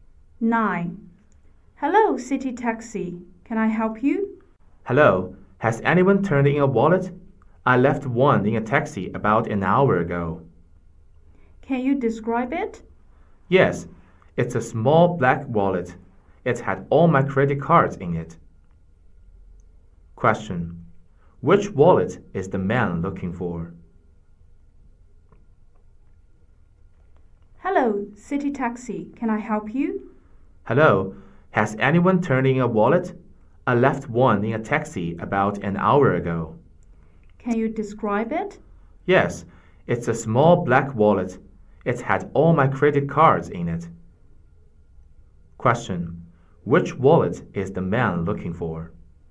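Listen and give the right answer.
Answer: A small black wallet with his credit cards in it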